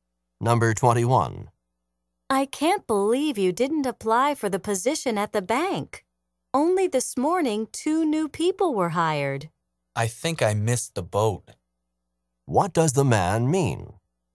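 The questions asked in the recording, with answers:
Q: What does the man mean?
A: He missed his chance to get the job.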